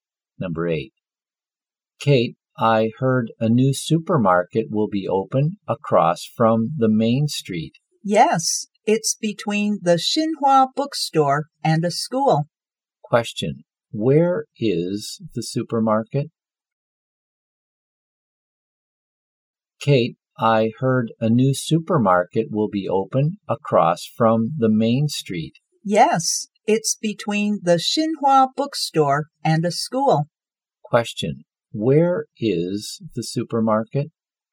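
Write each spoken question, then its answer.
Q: Question, where is the supermarket?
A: Between the Xinhua bookstore and a school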